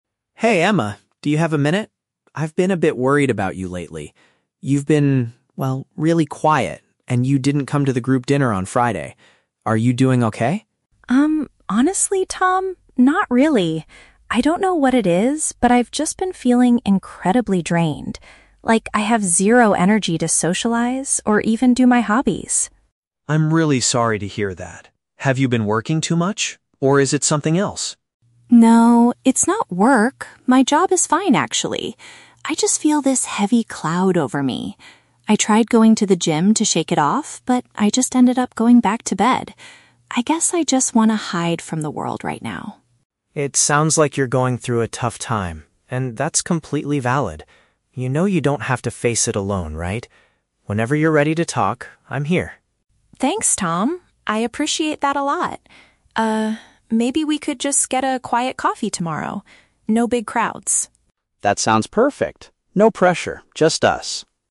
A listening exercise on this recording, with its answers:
Listen to a conversation between two close friends and choose the correct answer (A, B, or C) for each question.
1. Why has Emma been avoiding social events like the group dinner?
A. She had to work late at her job.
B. She lacked the mental energy to interact with others.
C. She was feeling physically ill with a bad cold.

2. What did Emma try to do to improve how she was feeling?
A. She attempted to do some physical exercise.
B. She spent more time focusing on her hobbies.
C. She talked to a professional therapist.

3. What do the two friends agree to do tomorrow?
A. Attend a large social gathering together.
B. Meet up in a peaceful and calm environment.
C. Go for a long walk around the neighborhood.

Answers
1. B
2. A
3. B

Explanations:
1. The Key: Emma says she has been feeling "incredibly drained" and has "zero energy to socialize", which is paraphrased as "lacked the mental energy to interact with others". The Trap (A): Tom asks if she has been working too much, but Emma explicitly rejects this ("No, it's not work. My job is fine"). The Trap (C): Plausible reason to miss a dinner, but sickness/a cold is never mentioned in the audio.
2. The Key: Emma mentions that she "tried going to the gym to shake it off", which is paraphrased as "attempted to do some physical exercise". The Trap (B): "Hobbies" are mentioned, but Emma says she has zero energy to do them (mentioned but rejected). The Trap (C): Seeing a therapist is a plausible action for mental health issues, but it is not mentioned in the conversation.
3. The Key: Emma suggests getting a "quiet coffee" with "no big crowds", and Tom agrees. This is paraphrased as meeting in a "peaceful and calm environment". The Trap (A): "Big crowds" are mentioned, but Emma explicitly states she wants no big crowds (mentioned but rejected). The Trap (C): Going for a walk is a plausible low-pressure activity, but it is not mentioned by either speaker.

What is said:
Tom: Hey Emma, do you have a minute? I've been a bit worried about you lately. You've been... well, really quiet, and you didn't come to the group dinner on Friday. Are you doing okay?
Emma: Um, honestly, Tom... not really. I don't know what it is, but I've just been feeling incredibly drained. Like, I have zero energy to socialize or even do my hobbies.
Tom: I'm really sorry to hear that. Have you been working too much? Or is it something else?
Emma: No, it's not work. My job is fine, actually. I just feel this heavy cloud over me. I tried going to the gym to shake it off, but I just ended up going back to bed. I guess I just want to hide from the world right now.
Tom: It sounds like you're going through a tough time, and that's completely valid. You know you don't have to face it alone, right? Whenever you're ready to talk, I'm here.
Emma: Thanks, Tom. I appreciate that a lot. maybe we could just get a quiet coffee tomorrow? No big crowds.
Tom: That sounds perfect. No pressure, just us.

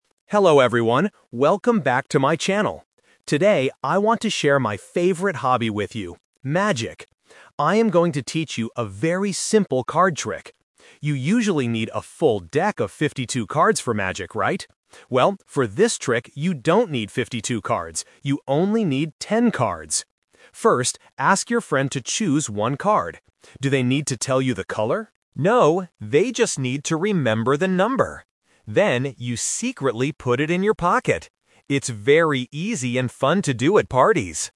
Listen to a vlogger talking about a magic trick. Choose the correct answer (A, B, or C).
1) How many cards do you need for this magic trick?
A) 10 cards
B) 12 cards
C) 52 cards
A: A

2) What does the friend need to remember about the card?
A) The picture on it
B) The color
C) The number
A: C

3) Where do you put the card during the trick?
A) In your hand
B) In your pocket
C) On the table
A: B

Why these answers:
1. The vlogger clearly states: "You only need 10 cards." Trap (The Twist): Option C (52 cards) is a very strong trap. The vlogger mentions 52 cards (a standard deck), but then immediately changes the subject: "Well, for this trick, you don't need 52 cards."
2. The vlogger instructs: "...they just need to remember the number." Trap: Option B (The color) is a trap. The vlogger mentions the word "color" in the rhetorical question "Do they need to tell you the color?", but immediately answers it himself with "No". Option A is not mentioned.
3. The vlogger explains the next step: "Then, you secretly put it in your pocket." Trap: Options A and C are familiar positions in card games but are completely absent from the listening exercise.

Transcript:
Vlogger: Hello everyone, welcome back to my channel! Today, I want to share my favorite hobby with you: magic. I am going to teach you a very simple card trick. You usually need a full deck of 52 cards for magic, right? Well, for this trick, you don't need 52 cards. You only need 10 cards. First, ask your friend to choose one card. Do they need to tell you the color? No, they just need to remember the number. Then, you secretly put it in your pocket. It's very easy and fun to do at parties!

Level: A2

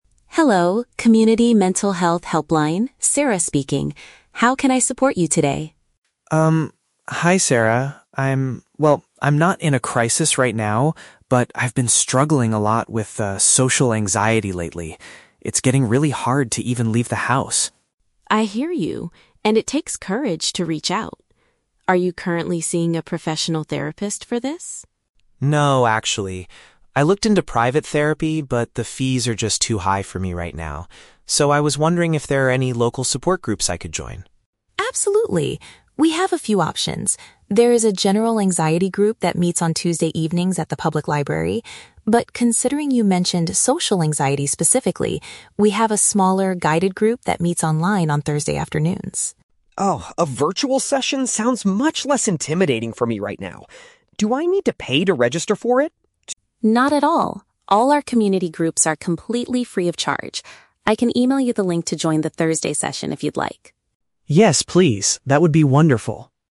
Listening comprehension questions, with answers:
Listen to a telephone conversation between a caller and a helpline volunteer. Choose the correct answer (A, B, or C) for each question.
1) Why did Mark decide NOT to get private therapy?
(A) He felt his anxiety was not severe enough to need a doctor.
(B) He could not afford the cost of the professional sessions.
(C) He could not find any therapists available in his local area.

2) Which support group does the volunteer think is best for Mark?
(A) A virtual meeting held on Thursday afternoons.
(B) A large gathering at the public library on Tuesdays.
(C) A daily online session for people in severe crisis.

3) What does Mark need to do to join the group?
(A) Pay a small registration fee on the website.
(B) Go to the library to fill out a registration form.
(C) Check his email to get the access link.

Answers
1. B
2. A
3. C

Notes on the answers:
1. Mark says "the fees are just too high for me right now". This is paraphrased as "could not afford the cost". The Trap (A): Mark mentions he is "not in a crisis right now", but this is not his reason for avoiding therapy. Cost is the real reason (Mentioned but wrong context). Plausible Trap (C): Not finding a local therapist is a common problem, but Mark never says this in the audio.
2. Sarah recommends the "smaller, guided group that meets online on Thursday afternoons" because Mark has social anxiety. Mark agrees that a "virtual session" is better for him. The Trap (B): The library group on Tuesdays is explicitly mentioned, but Sarah suggests the Thursday one instead, and Mark prefers the Thursday one because it is online (Mentioned but rejected). The Trap (C): The word "crisis" is mentioned at the beginning, but there is no daily group for people in crisis mentioned in the options.
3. Sarah says "I can email you the link to join". This matches option C perfectly. The Trap (A): Mark asks if he needs to "pay to register", but Sarah explicitly says "Not at all. All our community groups are completely free" (Mentioned but rejected). Plausible Trap (B): The library is mentioned earlier as a location for a different group, but Mark does not need to go there to fill out any forms (Mentioned but wrong context).

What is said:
Sarah: Hello, Community Mental Health Helpline, Sarah speaking. How can I support you today?
Mark: Um, hi Sarah. I'm... well, I'm not in a crisis right now, but I've been struggling a lot with, ah, social anxiety lately. It's getting really hard to even leave the house.
Sarah: I hear you, and it takes courage to reach out. Are you currently seeing a professional therapist for this?
Mark: No, actually. I looked into private therapy, but the fees are just too high for me right now. So, I was wondering if there are any local support groups I could join?
Sarah: Absolutely. We have a few options. There is a general anxiety group that meets on Tuesday evenings at the public library. But, considering you mentioned social anxiety specifically, we have a smaller, guided group that meets online on Thursday afternoons.
Mark: Oh, a virtual session sounds much less intimidating for me right now. Do I need to pay to register for it?
Sarah: Not at all. All our community groups are completely free of charge. I can email you the link to join the Thursday session if you'd like.

